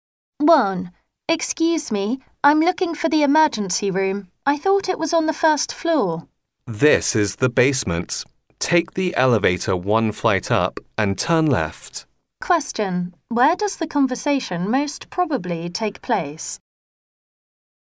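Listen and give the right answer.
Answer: In a hospital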